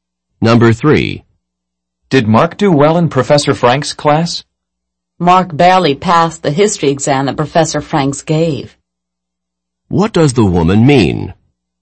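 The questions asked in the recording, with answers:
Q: What does the woman mean?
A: Mark didn't do well; he barely passed.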